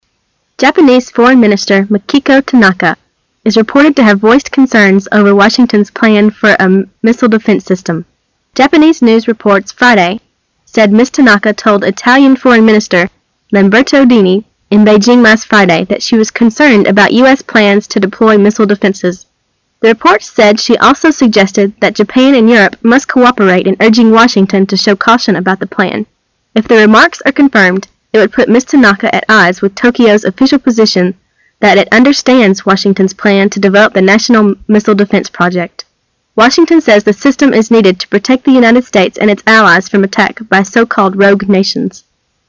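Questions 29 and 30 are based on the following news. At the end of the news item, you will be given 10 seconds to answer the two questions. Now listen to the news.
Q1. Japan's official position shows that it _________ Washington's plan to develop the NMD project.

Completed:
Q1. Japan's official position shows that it understands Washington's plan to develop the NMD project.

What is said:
[解析] 29-30 Japanese Foreign Minister Makiko Tanaka is reported to have voiced concerns over Washington's plan for a missile defense system. Japanese news reports Friday said Ms. Tanaka told Italian Foreign Minister Lamberto Dini in Beijing last Friday that she was concerned about U.S. plans to deploy missile defenses. The reports said she also suggested that Japan and Europe must cooperate in urging Washington to show caution about the plan. If the remarks are confirmed, it would put Ms. Tanaka at odds with Tokyo's official position that it "understands" Washington's plan to develop the National Missile Defense project. 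Washington says the system is needed to protect the United States and its allies from attack by so-called rogue nations.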